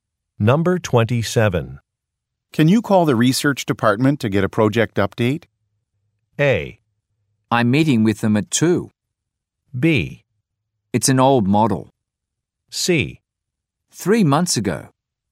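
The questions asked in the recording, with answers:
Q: Can you call the research department to get a project update?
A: A: I'm meeting with them at 2.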